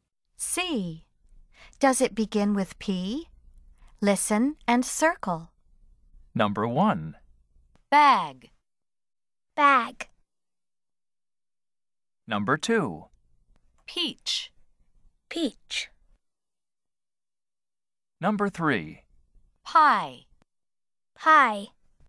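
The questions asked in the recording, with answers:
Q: Peach.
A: Yes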